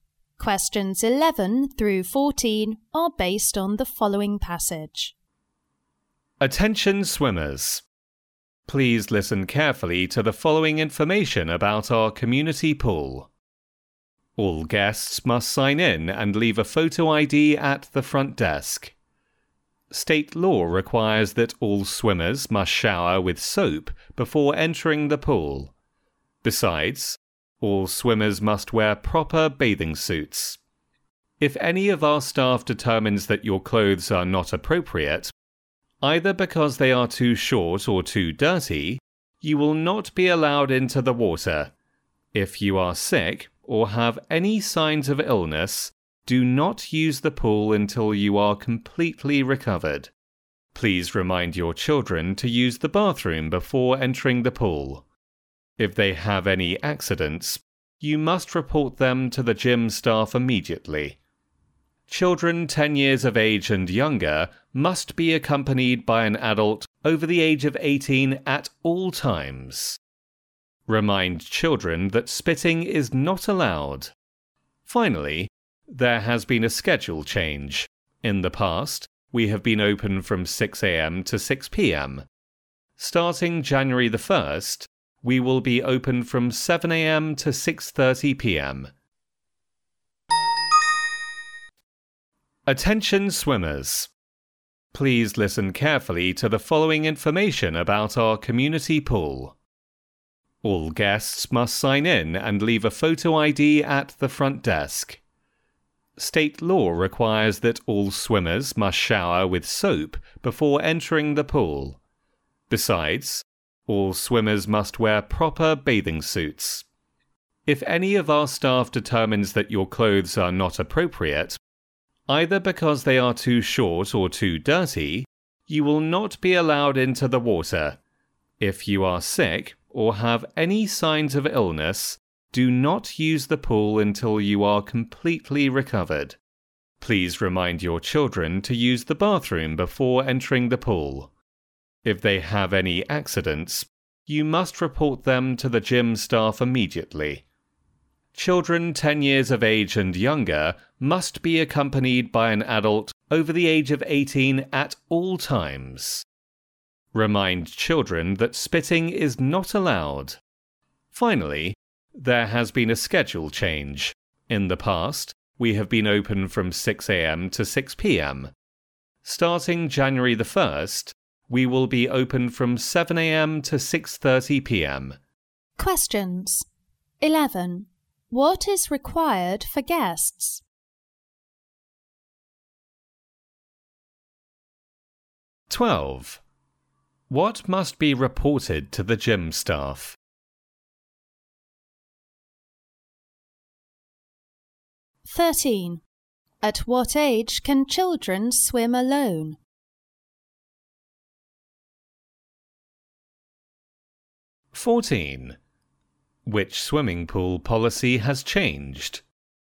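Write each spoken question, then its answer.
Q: What is required for guests?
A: To sign in and leave a photo ID at the front desk

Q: What must be reported to the gym staff?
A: Any accidents children have

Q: At what age can children swim alone?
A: Over 10 years old

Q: Which swimming pool policy has changed?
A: The opening hours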